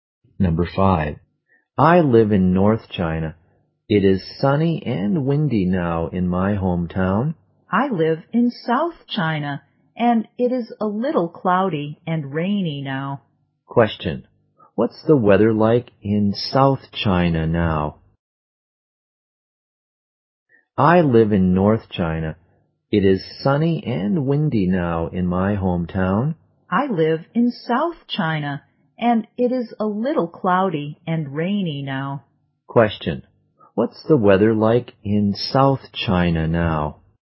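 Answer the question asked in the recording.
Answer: A little cloudy and rainy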